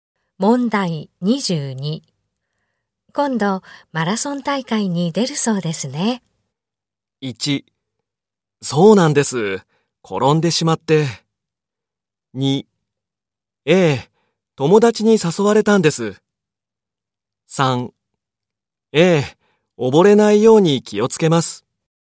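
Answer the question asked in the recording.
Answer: 2: ええ、友達に誘われたんです。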